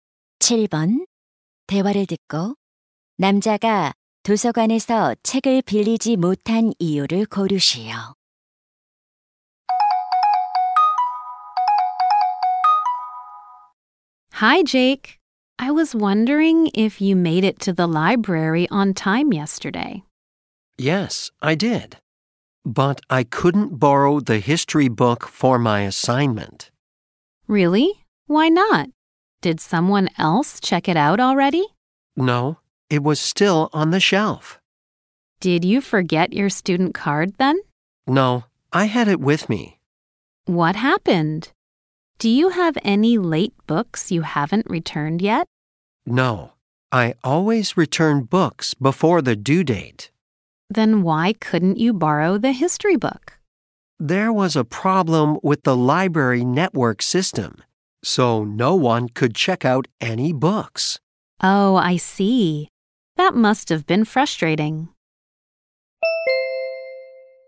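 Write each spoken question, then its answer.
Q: 대화를 듣고 남자가 도서관에서 책을 빌리지 못한 이유를 고르시오.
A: 도서관 네트워크 시스템에 문제가 있어서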